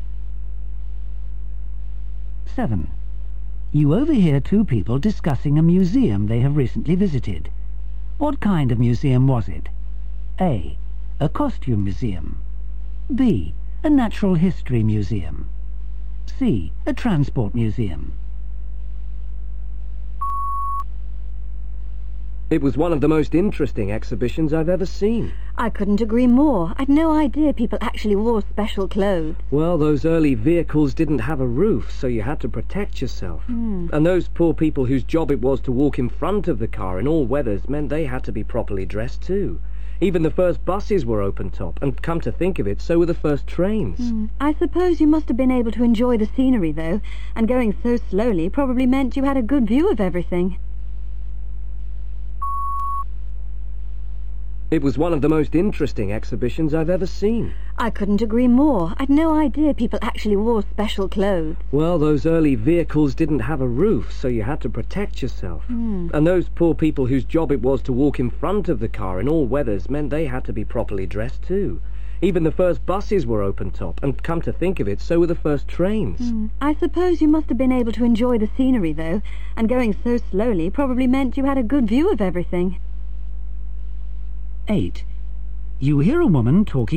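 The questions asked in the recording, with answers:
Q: What kind of museum was it?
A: C: A transport museum.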